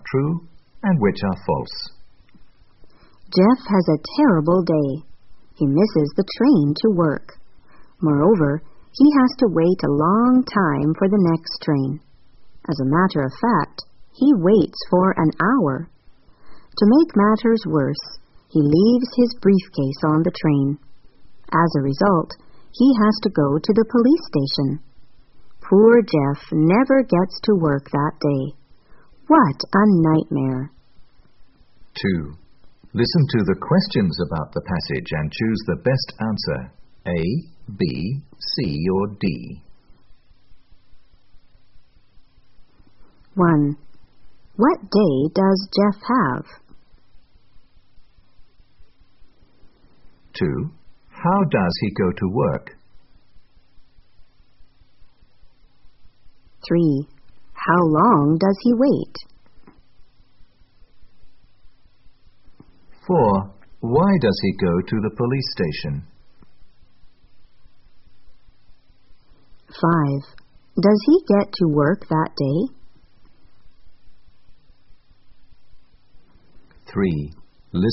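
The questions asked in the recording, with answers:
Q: What day does Jeff have?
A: A terrible day

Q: How does he go to work?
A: By train

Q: How long does he wait?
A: For an hour

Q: Why does he go to the police station?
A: Because he leaves his briefcase on the train

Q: Does he get to work that day?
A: No, he never gets to work that day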